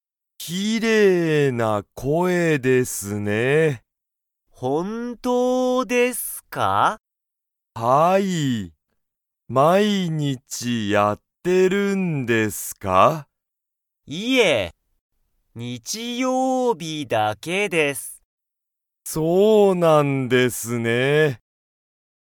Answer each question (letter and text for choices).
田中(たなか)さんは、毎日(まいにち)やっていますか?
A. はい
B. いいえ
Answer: B. いいえ

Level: Level 1